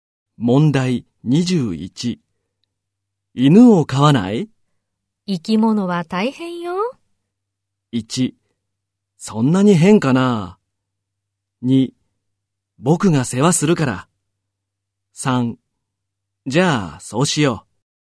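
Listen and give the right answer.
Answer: 2: 僕が世話するから。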